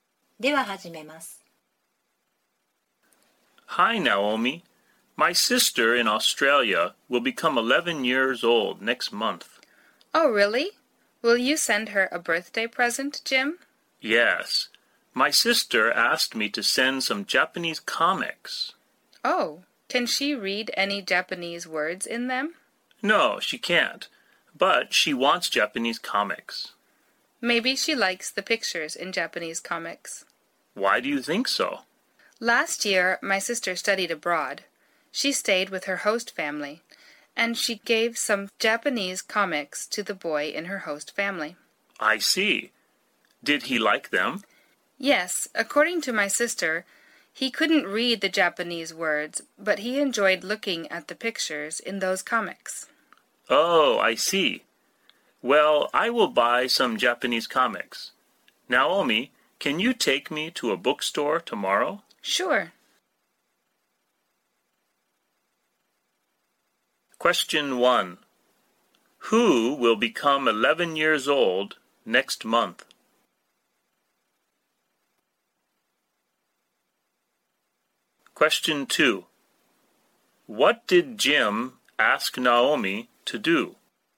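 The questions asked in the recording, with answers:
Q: Who will become 11 years old next month?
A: Jim's sister

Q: What did Jim ask Naomi to do?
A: To take him to a bookstore tomorrow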